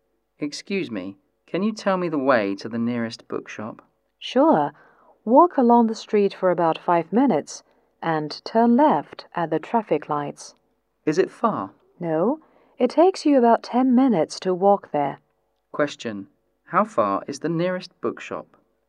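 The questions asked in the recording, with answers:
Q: How far is the nearest bookshop?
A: About 10 minutes' walk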